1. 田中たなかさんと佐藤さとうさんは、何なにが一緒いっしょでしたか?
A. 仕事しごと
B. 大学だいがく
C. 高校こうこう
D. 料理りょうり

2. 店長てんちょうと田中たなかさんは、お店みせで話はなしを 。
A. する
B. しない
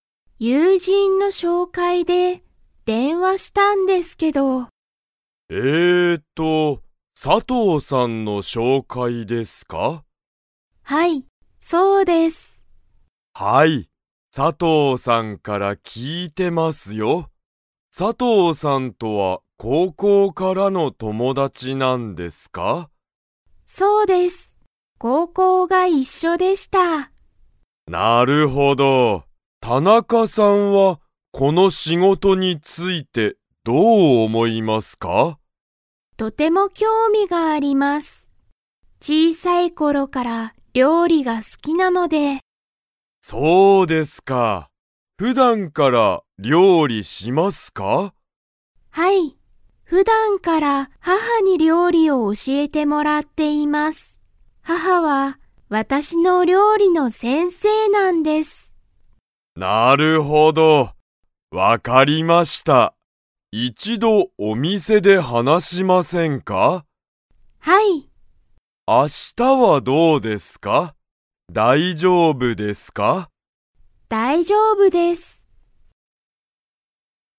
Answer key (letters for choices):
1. C
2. A

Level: Level 3